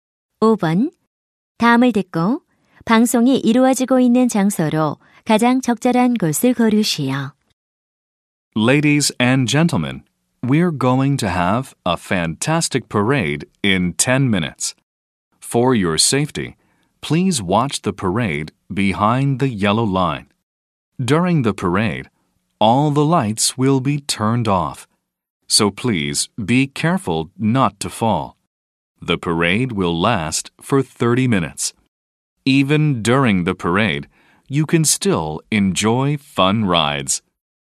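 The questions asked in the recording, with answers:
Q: 다음을 듣고 방송이 이루어지고 있는 장소로 가장 적절한 곳을 고르시오.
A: 놀이공원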